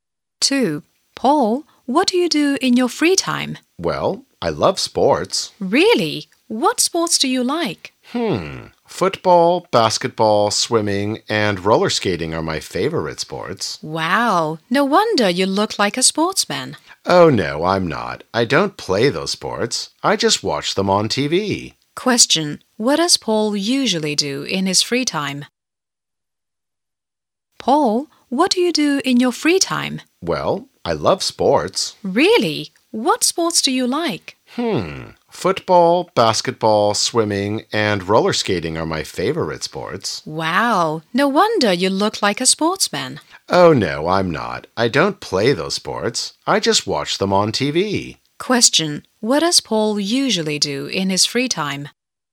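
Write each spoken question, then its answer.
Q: Question, what does Paul usually do in his free time?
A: He watches sports on TV.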